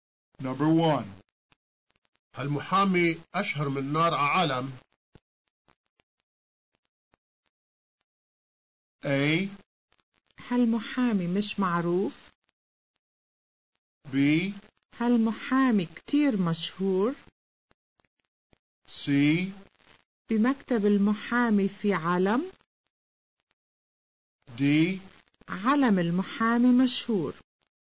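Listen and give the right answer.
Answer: B: هل محامي كتير مشهور؟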